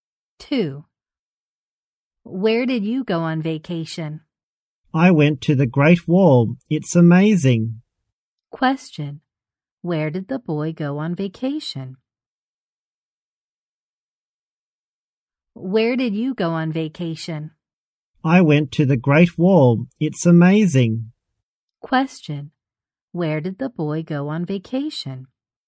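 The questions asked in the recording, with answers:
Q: Where did the boy go on vacation?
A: The Great Wall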